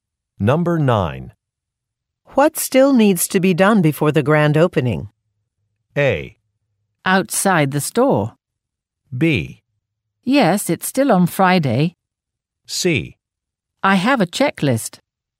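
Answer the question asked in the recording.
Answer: C: I have a checklist.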